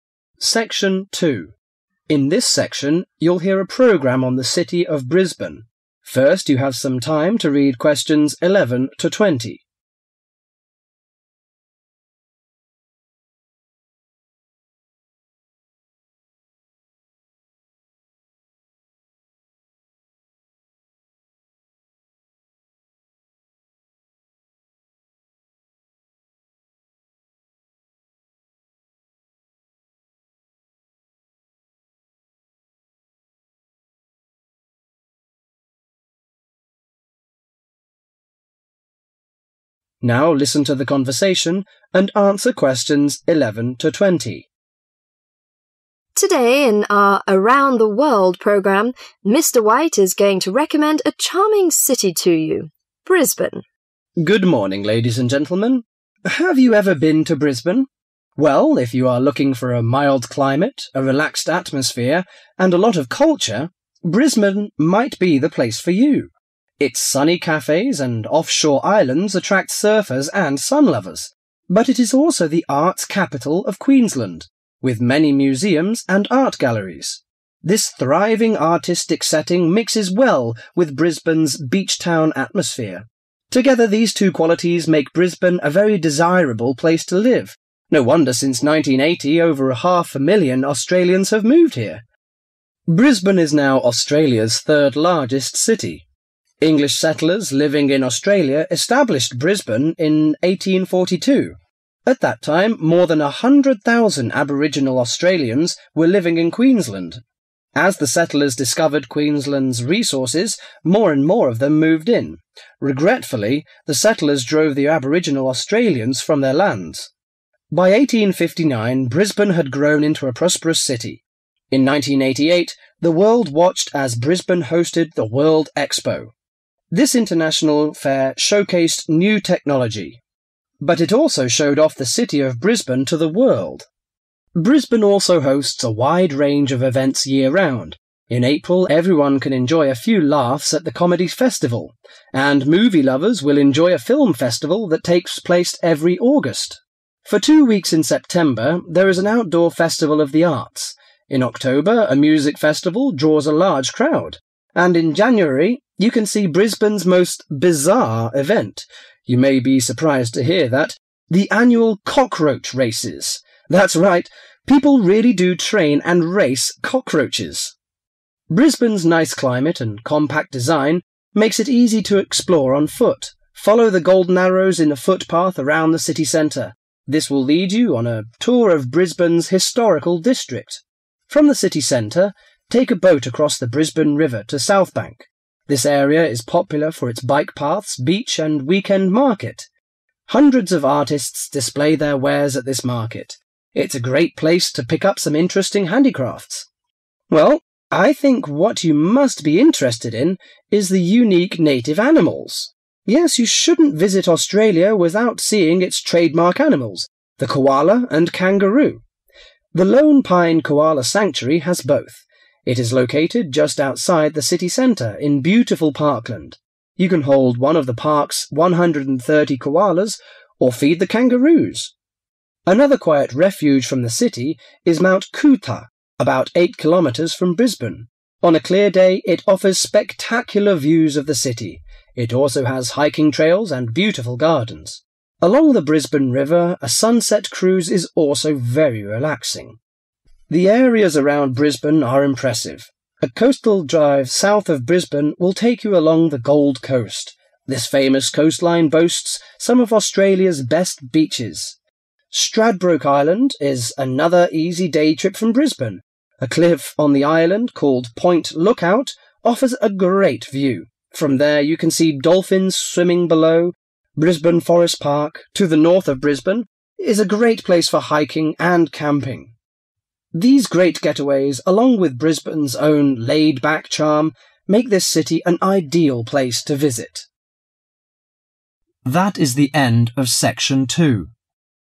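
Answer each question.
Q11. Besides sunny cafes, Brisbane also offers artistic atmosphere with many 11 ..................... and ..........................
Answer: museums; art galleries

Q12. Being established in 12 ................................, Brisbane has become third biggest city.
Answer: 1842

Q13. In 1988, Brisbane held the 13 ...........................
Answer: World Expo

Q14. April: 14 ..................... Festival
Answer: Comedy

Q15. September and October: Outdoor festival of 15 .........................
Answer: the arts

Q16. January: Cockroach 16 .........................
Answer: races

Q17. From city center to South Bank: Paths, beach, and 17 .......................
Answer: weekend market

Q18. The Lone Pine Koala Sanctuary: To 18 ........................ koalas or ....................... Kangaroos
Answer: hold; feed

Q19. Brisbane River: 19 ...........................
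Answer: sunset cruise

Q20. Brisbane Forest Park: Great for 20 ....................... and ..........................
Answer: hiking; camping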